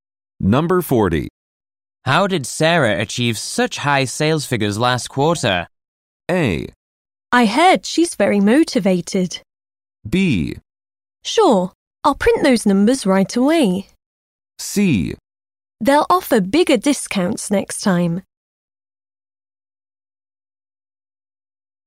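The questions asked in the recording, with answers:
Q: How did Sarah achieve such high sales figures last quarter?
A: A: I heard she's very motivated.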